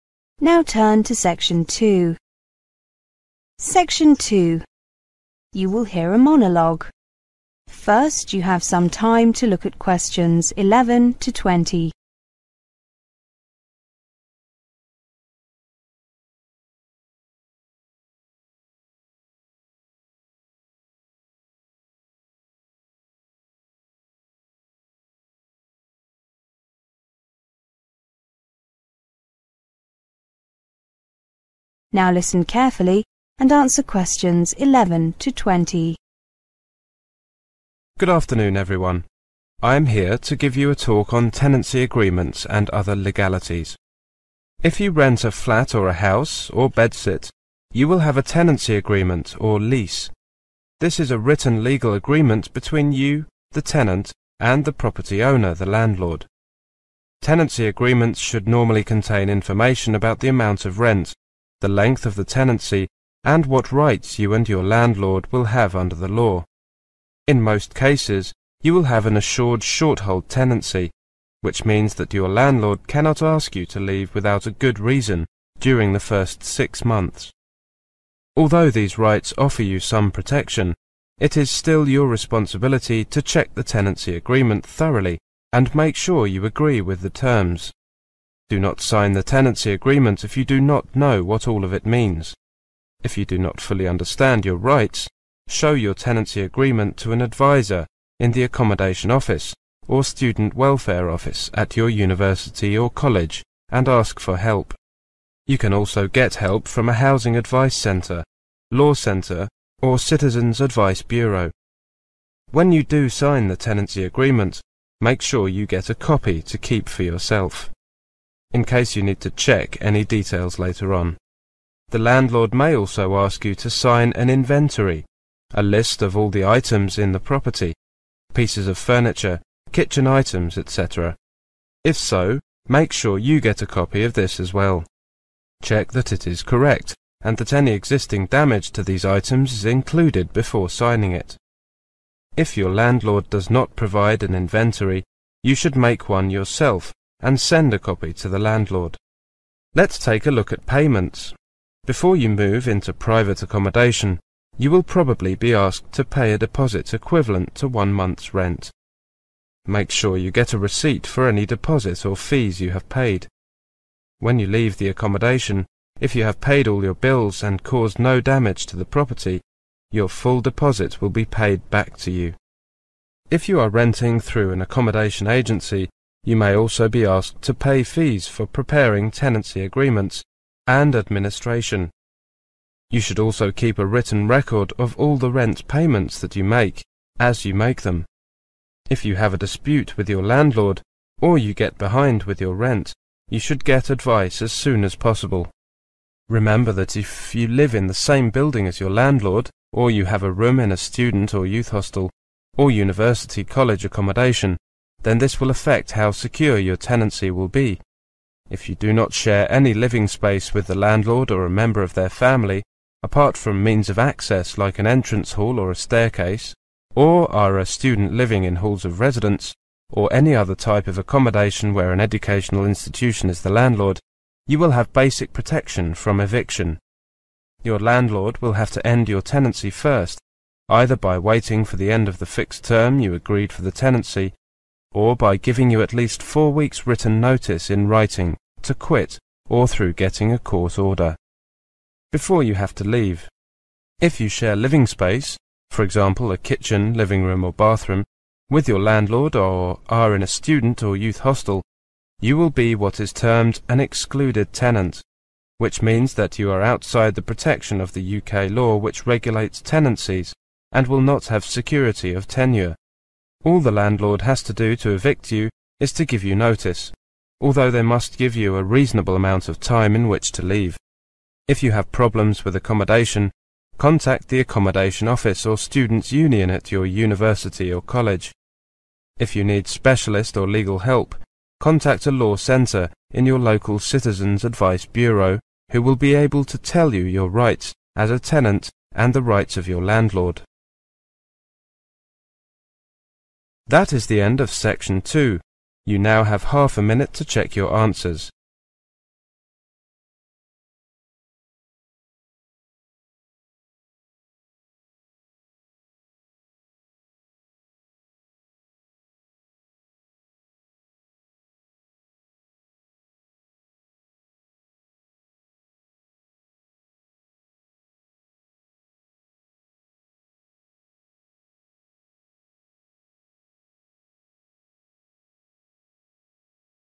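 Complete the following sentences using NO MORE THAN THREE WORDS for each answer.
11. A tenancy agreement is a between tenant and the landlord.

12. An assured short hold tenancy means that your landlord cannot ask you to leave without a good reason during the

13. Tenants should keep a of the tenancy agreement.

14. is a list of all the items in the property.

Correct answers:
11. written legal agreement
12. first 6 months
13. copy
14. An inventory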